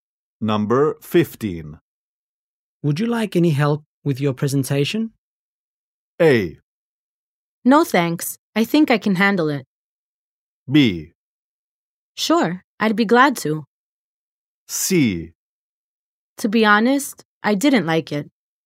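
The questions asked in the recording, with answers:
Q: Would you like any help with your presentation?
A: A: No, thanks. I think I can handle it.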